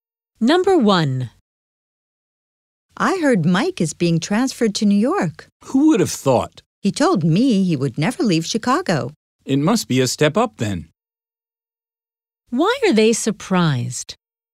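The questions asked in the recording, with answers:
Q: Why are they surprised?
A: Mike said he would never leave Chicago, but he is being transferred to New York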